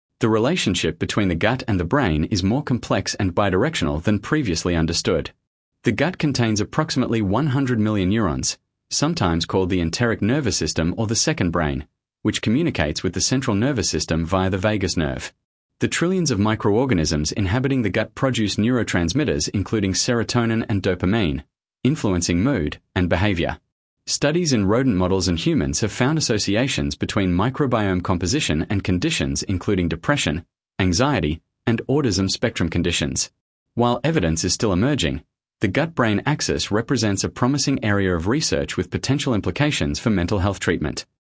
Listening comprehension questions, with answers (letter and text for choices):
Task reminder: Read all options before the audio starts. Select the paragraph that best summarises the recording. The correct answer matches the main idea and tone, not just one detail.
Sample Text 2 — The Gut-Brain Connection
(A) A. The gut bacteria have been definitively proven to cause depression and anxiety in all affected individuals.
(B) B. Emerging research suggests that the gut microbiome may influence mental health through the gut-brain axis, though the field remains early-stage.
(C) C. The gut and brain are connected only by the digestive system, with no neurological or hormonal pathways involved.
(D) D. Diet has no measurable effect on gut microbiome composition or mental health outcomes.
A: (B) B. Emerging research suggests that the gut microbiome may influence mental health through the gut-brain axis, though the field remains early-stage.